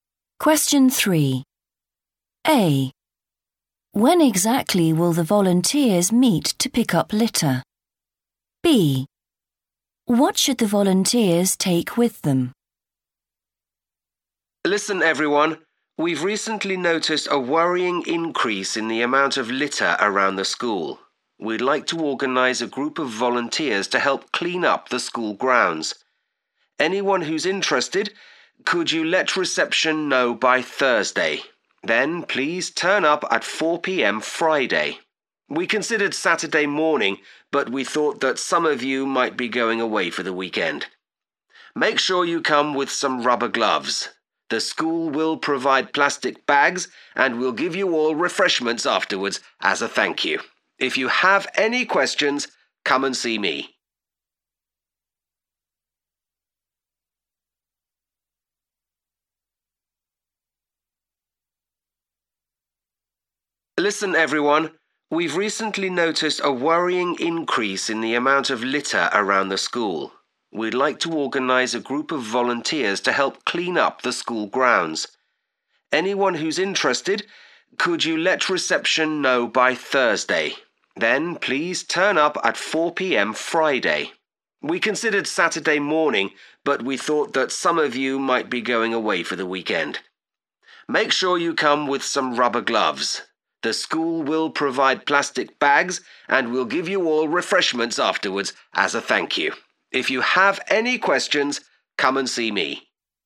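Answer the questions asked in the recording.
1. 4 p.m. Friday
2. rubber gloves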